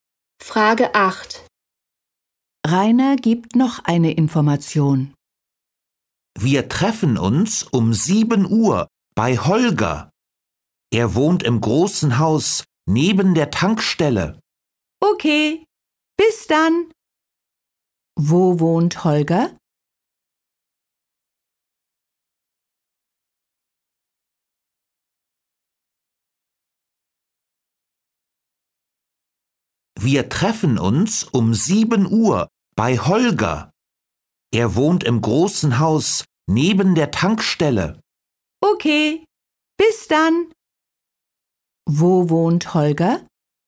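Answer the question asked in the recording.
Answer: Im großen Haus neben der Tankstelle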